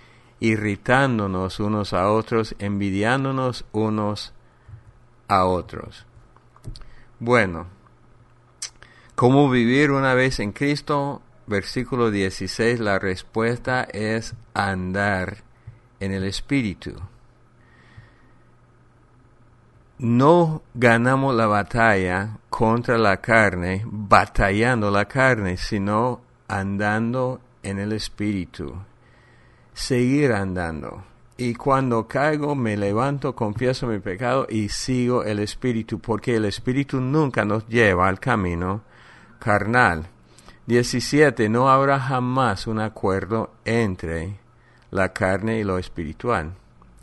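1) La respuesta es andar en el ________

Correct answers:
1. Espíritu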